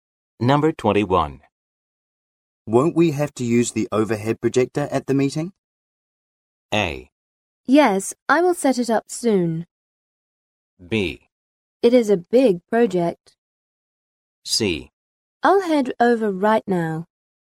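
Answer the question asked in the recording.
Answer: A: Yes, I will set it up soon.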